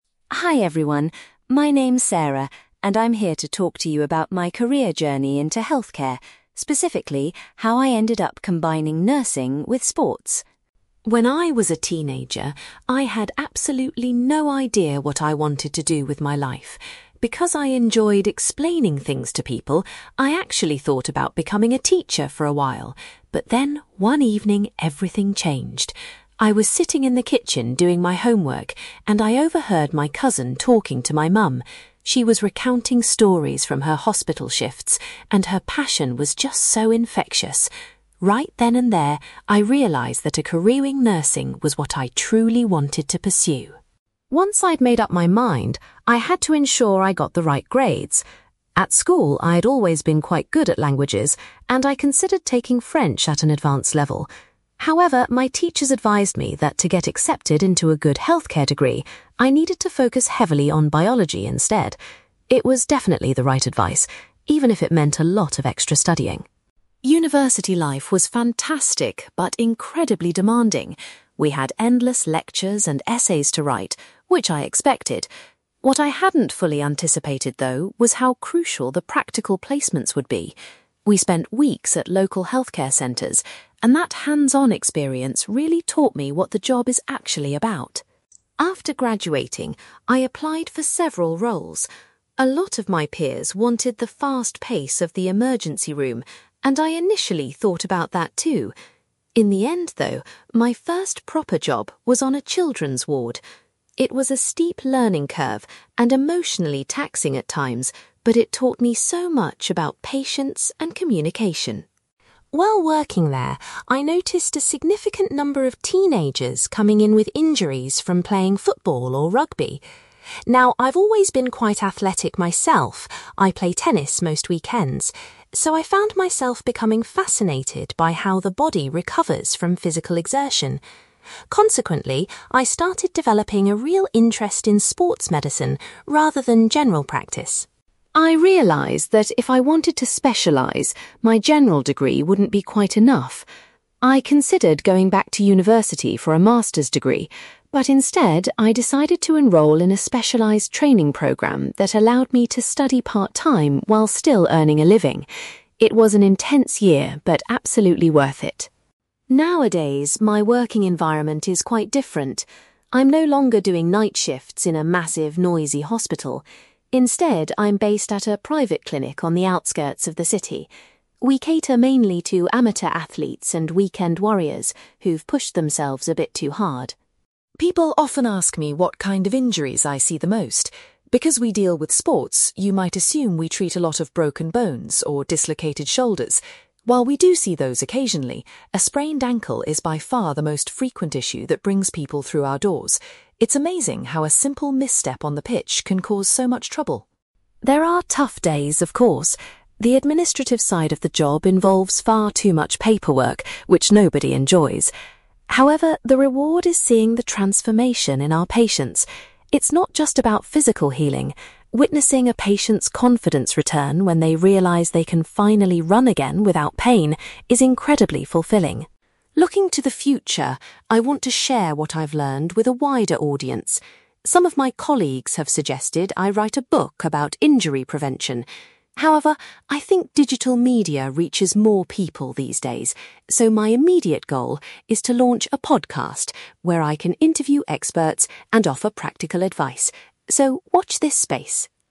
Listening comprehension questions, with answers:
You will hear a nurse called Sarah giving a talk about her career in healthcare and sports medicine. For questions 9-18, complete the sentences with a word or short phrase.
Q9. Sarah decided she wanted to pursue a career in (9)........................... after listening to her cousin's stories.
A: nursing

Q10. Sarah's teachers suggested she concentrate on (10)........................... to secure a place on a healthcare course.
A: biology

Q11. Sarah felt that the (11)........................... she did at university were the most important part of her studies.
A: practical placements

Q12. Sarah's first role as a qualified professional was working on a (12)........................... .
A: children's ward

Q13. Treating injured young athletes led Sarah to become interested in (13)........................... .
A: sports medicine

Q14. Sarah chose to complete a (14)........................... to gain the specific skills she needed for her new path.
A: training programme

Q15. Sarah is currently employed at a (15)........................... that treats non-professional athletes.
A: private clinic

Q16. Sarah says that a (16)........................... is the most common injury she helps to treat.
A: sprained ankle

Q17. Sarah finds it highly rewarding to see a patient's (17)........................... come back after a period of recovery.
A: confidence

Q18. In the future, Sarah plans to start a (18)........................... to share tips on avoiding sports injuries.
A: podcast

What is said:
Sarah: Hi everyone. My name's Sarah, and I'm here to talk to you about my career journey into healthcare, specifically how I ended up combining nursing with sports.
When I was a teenager, I had absolutely no idea what I wanted to do with my life. Because I enjoyed explaining things to people, I actually thought about becoming a teacher for a while. But then, one evening, everything changed. I was sitting in the kitchen doing my homework, and I overheard my cousin talking to my mum. She was recounting stories from her hospital shifts, and her passion was just so infectious. Right then and there, I realised that a career in nursing was what I truly wanted to pursue.
Once I'd made up my mind, I had to ensure I got the right grades. At school, I'd always been quite good at languages, and I considered taking French at an advanced level. However, my teachers advised me that to get accepted into a good healthcare degree, I needed to focus heavily on biology instead. It was definitely the right advice, even if it meant a lot of extra studying!
University life was fantastic but incredibly demanding. We had endless lectures and essays to write, which I expected. What I hadn't fully anticipated, though, was how crucial the practical placements would be. We spent weeks at local healthcare centres, and that hands-on experience really taught me what the job is actually about.
After graduating, I applied for several roles. A lot of my peers wanted the fast pace of the emergency room, and I initially thought about that too. In the end, though, my first proper job was on a children's ward. It was a steep learning curve and emotionally taxing at times, but it taught me so much about patience and communication.
While working there, I noticed a significant number of teenagers coming in with injuries from playing football or rugby. Now, I've always been quite athletic myself—I play tennis most weekends—so I found myself becoming fascinated by how the body recovers from physical exertion. Consequently, I started developing a real interest in sports medicine, rather than general practice.
I realised that if I wanted to specialise, my general degree wouldn't be quite enough. I considered going back to university for a master's degree, but instead, I decided to enrol in a specialised training programme that allowed me to study part-time while still earning a living. It was an intense year, but absolutely worth it.
Nowadays, my working environment is quite different. I'm no longer doing night shifts in a massive, noisy hospital. Instead, I'm based at a private clinic on the outskirts of the city. We cater mainly to amateur athletes and weekend warriors who've pushed themselves a bit too hard.
People often ask me what kind of injuries I see the most. Because we deal with sports, you might assume we treat a lot of broken bones or dislocated shoulders. While we do see those occasionally, a sprained ankle is by far the most frequent issue that brings people through our doors. It's amazing how a simple misstep on the pitch can cause so much trouble.
There are tough days, of course. The administrative side of the job involves far too much paperwork, which nobody enjoys. However, the reward is seeing the transformation in our patients. It's not just about physical healing; witnessing a patient's confidence return when they realise they can finally run again without pain is incredibly fulfilling.
Looking to the future, I want to share what I've learned with a wider audience. Some of my colleagues have suggested I write a book about injury prevention. However, I think digital media reaches more people these days, so my immediate goal is to launch a podcast where I can interview experts and offer practical advice. So, watch this space!

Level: B2